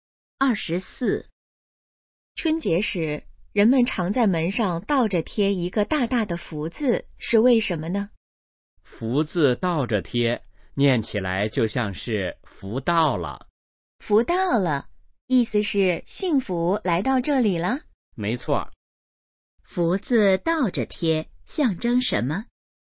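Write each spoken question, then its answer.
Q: 福字倒着贴,象征什么?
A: 福到了,幸福来到这里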